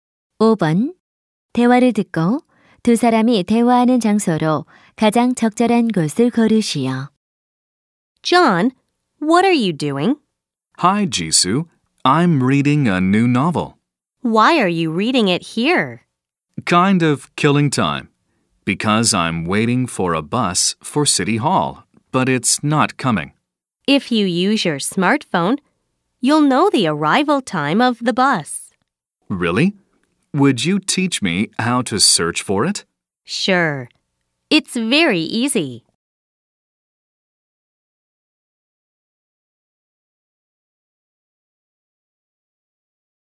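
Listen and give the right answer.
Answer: 버스 정류장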